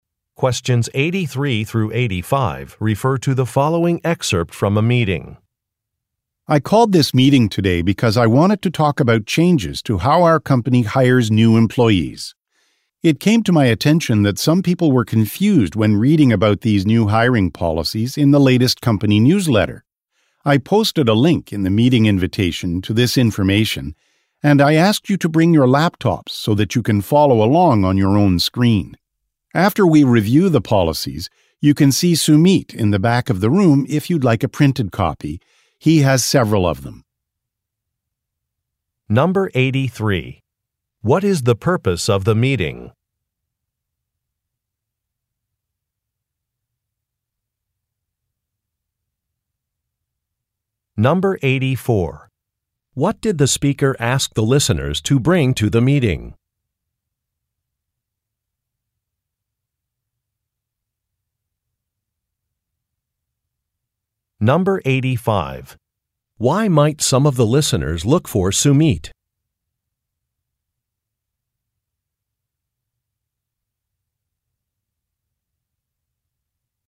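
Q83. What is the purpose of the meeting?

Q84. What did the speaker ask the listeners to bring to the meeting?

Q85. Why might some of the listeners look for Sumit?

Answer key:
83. To explain new hiring policies
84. Laptops
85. To get a printed copy of the policies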